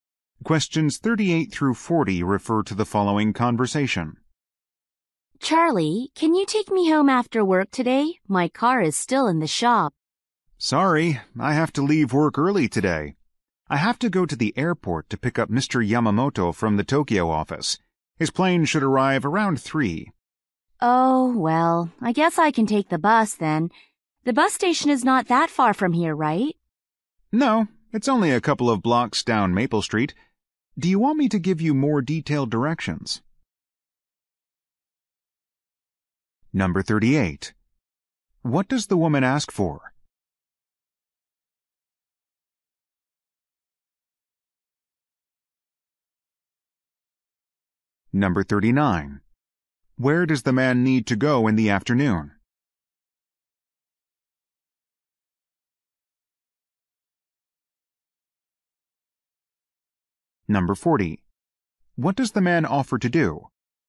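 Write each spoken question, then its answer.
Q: What does the woman ask for?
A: A ride home after work

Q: Where does the man need to go in the afternoon?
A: The airport

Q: What does the man offer to do?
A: Give her more detailed directions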